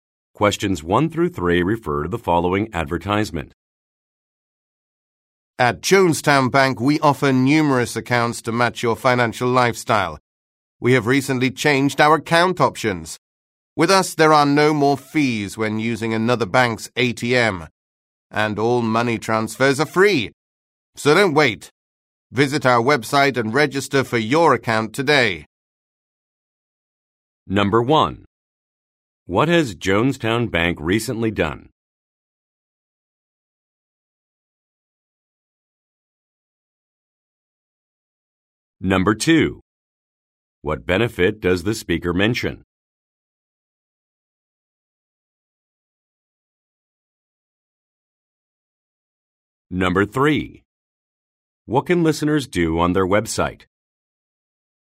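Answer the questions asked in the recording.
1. Changed its account options
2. No fees at other banks' ATMs and free money transfers
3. Register for an account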